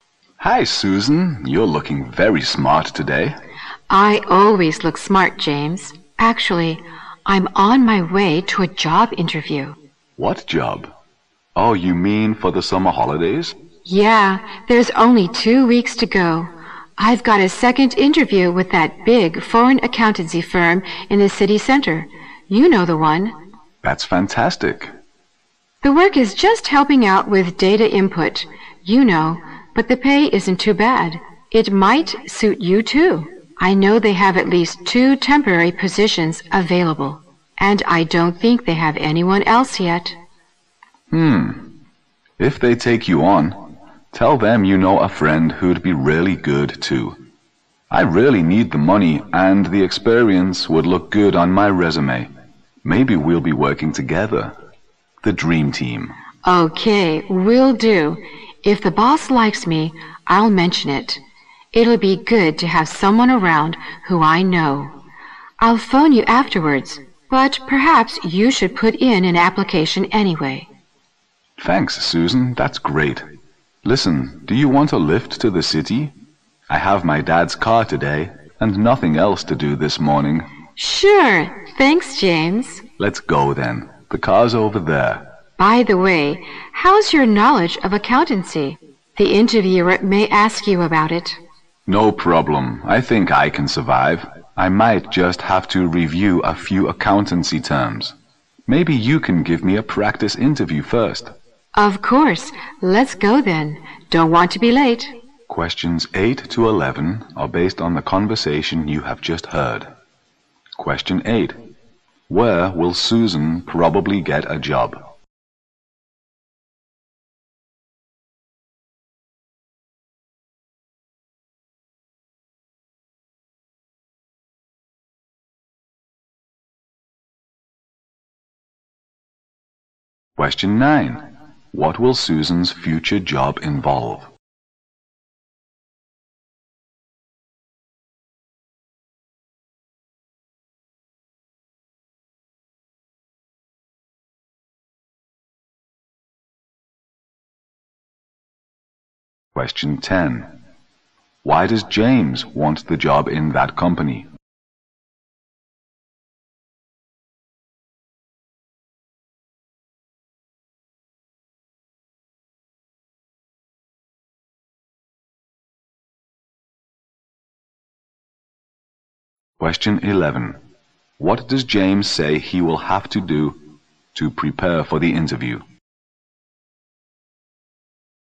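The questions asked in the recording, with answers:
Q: Where will Susan probably get a job?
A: At a big foreign accountancy firm in the city center

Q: What will Susan's future job involve?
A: Helping out with data input

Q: Why does James want the job in that company?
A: He needs the money and the experience would look good on his resume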